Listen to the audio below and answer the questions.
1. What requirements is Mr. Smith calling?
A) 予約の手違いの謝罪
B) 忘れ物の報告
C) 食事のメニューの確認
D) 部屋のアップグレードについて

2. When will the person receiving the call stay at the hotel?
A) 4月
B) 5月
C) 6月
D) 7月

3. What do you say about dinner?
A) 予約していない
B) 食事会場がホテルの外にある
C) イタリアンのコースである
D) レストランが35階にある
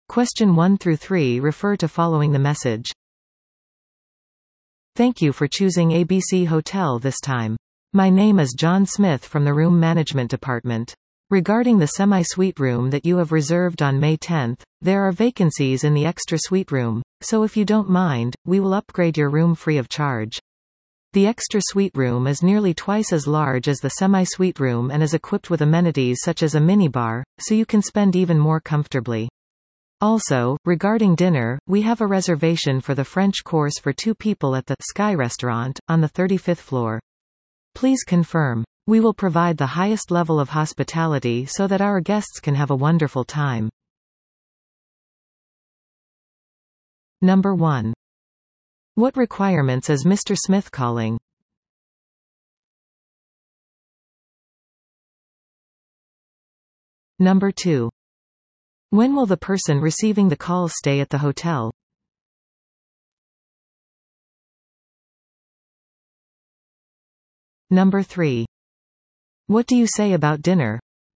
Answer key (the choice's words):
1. 部屋のアップグレードについて
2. 5月
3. レストランが35階にある

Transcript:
"Thank you for choosing ABC Hotel this time.
My name is John Smith from the Room Management Department.
Regarding the semi-suite room that you have reserved on May 10th, there are vacancies in the extra suite room, so if you don't mind, we will upgrade your room free of charge.The extra suite room is nearly twice as large as the semi-suite room and is equipped with amenities such as a mini bar, so you can spend even more comfortably.Also, regarding dinner, we have a reservation for the French course for 2 people at the ""Sky Restaurant"" on the 35th floor.
please confirm.
We will provide the highest level of hospitality so that our guests can have a wonderful time."